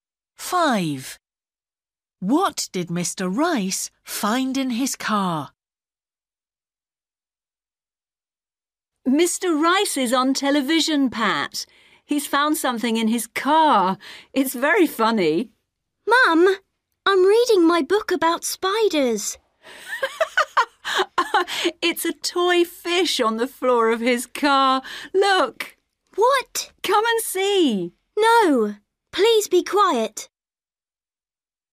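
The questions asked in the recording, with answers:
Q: What did Mr. Rice find in his car?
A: a toy fish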